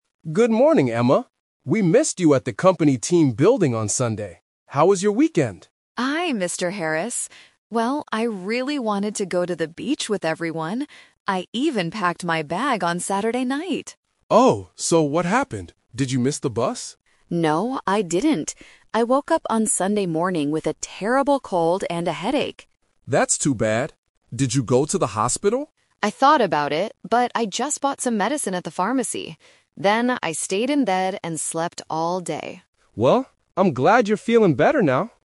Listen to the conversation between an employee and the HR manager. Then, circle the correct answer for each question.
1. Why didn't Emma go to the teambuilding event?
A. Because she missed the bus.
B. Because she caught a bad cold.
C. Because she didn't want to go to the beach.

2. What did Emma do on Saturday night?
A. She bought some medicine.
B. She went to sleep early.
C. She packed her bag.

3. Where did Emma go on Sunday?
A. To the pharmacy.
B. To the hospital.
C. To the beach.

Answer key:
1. B
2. C
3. A

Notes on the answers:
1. Emma explains the real reason: "I woke up on Sunday morning with a terrible cold and a headache." Option (A) is the trap; Mr. Harris guesses she missed the bus, but she says "No." Option (C) is incorrect because she says she "really wanted to go."
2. Emma says, "I even packed my bag on Saturday night." Option (A) is a trap; she bought medicine on Sunday, not Saturday. Option (B) is never mentioned.
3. Emma says, "I just bought some medicine at the pharmacy." Option (B) is the trap (The Twist); Mr. Harris asks if she went to the hospital, and she thought about it, but didn't go. Option (C) is the location of the teambuilding, which she missed.

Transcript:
Mr. Harris: Good morning, Emma. We missed you at the company teambuilding on Sunday. How was your weekend?
Emma: Hi, Mr. Harris. Well, I really wanted to go to the beach with everyone. I even packed my bag on Saturday night.
Mr. Harris: Oh, so what happened? Did you miss the bus?
Emma: No, I didn't. I woke up on Sunday morning with a terrible cold and a headache.
Mr. Harris: That's too bad. Did you go to the hospital?
Emma: I thought about it, but I just bought some medicine at the pharmacy. Then, I stayed in bed and slept all day.

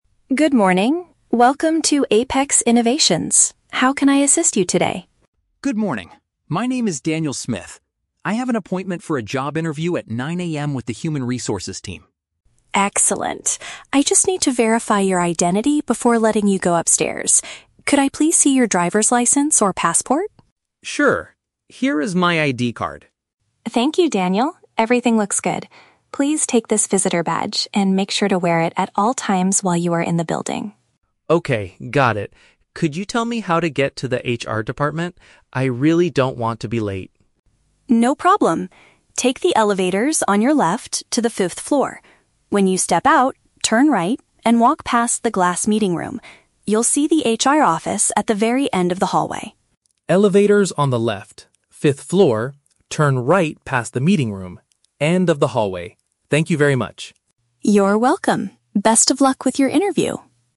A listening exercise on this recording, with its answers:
Listen to a conversation between a candidate and a receptionist at a company lobby. Choose the best answer (A, B, or C) for each question.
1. What is the main reason Daniel is talking to the receptionist?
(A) To apply for a position as a security guard.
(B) To check in for his scheduled meeting.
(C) To hand in a printed copy of his resume.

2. What does the receptionist ask Daniel to show her?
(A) An official document proving who he is.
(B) The invitation email from the HR manager.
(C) A list of references from his previous job.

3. Where exactly is the Human Resources office located?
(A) Inside the glass meeting room on the first floor.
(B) On the left side immediately after stepping out of the elevator.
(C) At the end of the corridor on level five.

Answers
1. B
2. A
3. C

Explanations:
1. Daniel states he has an "appointment for a job interview at 9:00 AM." Paraphrasing: appointment for a job interview = scheduled meeting; reporting to the receptionist = checking in.
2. The receptionist needs to "verify your identity" and asks for a "driver's license or passport." Daniel gives his "ID card." Paraphrasing: verify identity / driver's license / ID card = official document proving who he is.
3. The receptionist tells him to go to the "fifth floor" and that the office is at the "very end of the hallway." Paraphrasing: fifth floor = level five; hallway = corridor.

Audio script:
Receptionist: Good morning, welcome to Apex Innovations. How can I assist you today?
Candidate: Good morning. My name is Daniel Smith. I have an appointment for a job interview at 9:00 AM with the Human Resources team.
Receptionist: Excellent. I just need to verify your identity before letting you go upstairs. Could I please see your driver's license or passport?
Candidate: Sure, here is my ID card.
Receptionist: Thank you, Daniel. Everything looks good. Please take this visitor badge and make sure to wear it at all times while you are in the building.
Candidate: Okay, got it. Could you tell me how to get to the HR department? I really don't want to be late.
Receptionist: No problem. Take the elevators on your left to the fifth floor. When you step out, turn right and walk past the glass meeting room. You'll see the HR office at the very end of the hallway.
Candidate: Elevators on the left, fifth floor, turn right past the meeting room, end of the hallway. Thank you very much!
Receptionist: You're welcome. Best of luck with your interview!

